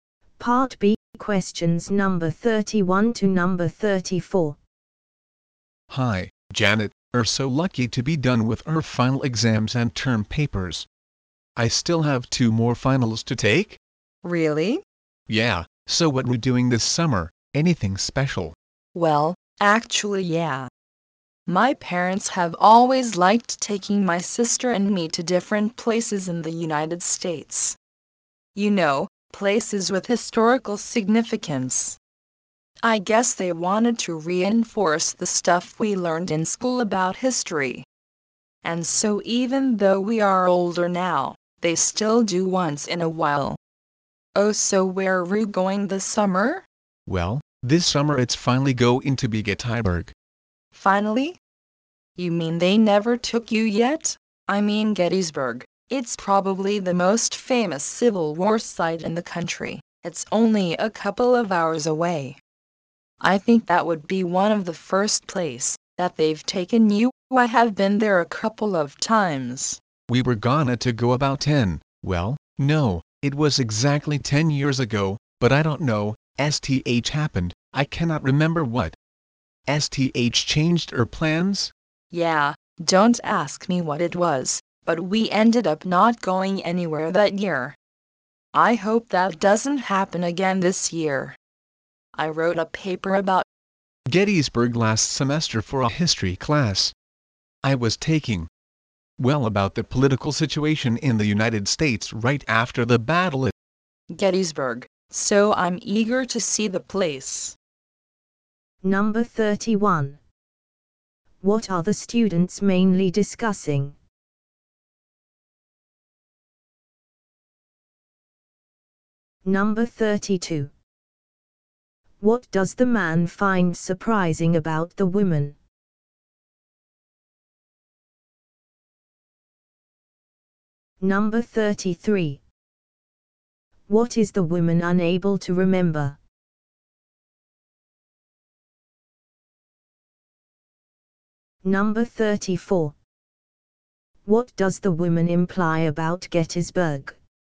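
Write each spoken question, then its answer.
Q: What are the students mainly discussing?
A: The woman's summer trip with her parents to Gettysburg

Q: What does the man find surprising about the woman?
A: She has never been to Gettysburg, even though it is close

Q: What is the woman unable to remember?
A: What changed their plans to visit Gettysburg ten years ago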